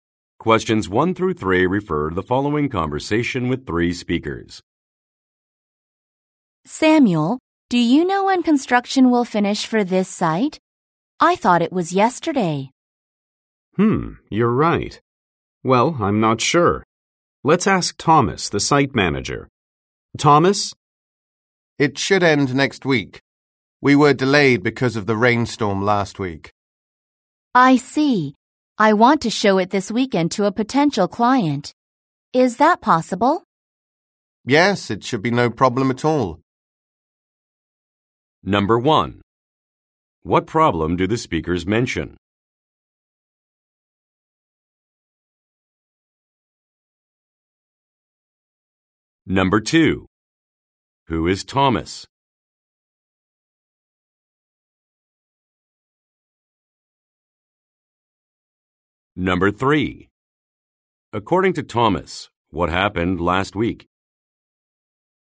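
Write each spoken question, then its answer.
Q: What problem do the speakers mention?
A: The construction is delayed

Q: Who is Thomas?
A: The site manager

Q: According to Thomas, what happened last week?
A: There was a rainstorm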